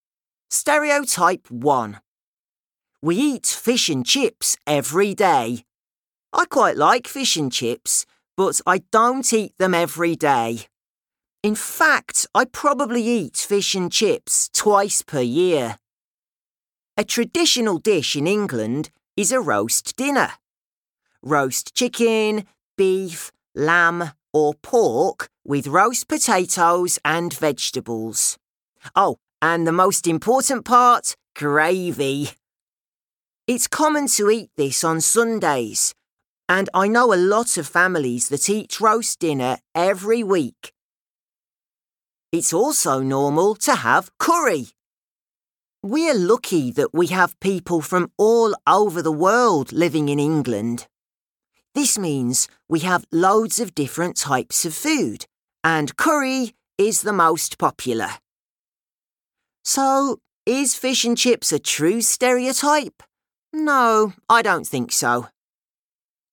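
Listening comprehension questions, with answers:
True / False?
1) Josh likes fish and chips so that he eats them every day.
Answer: False

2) A traditional dish in Scotland is a roast dinner.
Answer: False

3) Curry is the least popular.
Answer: False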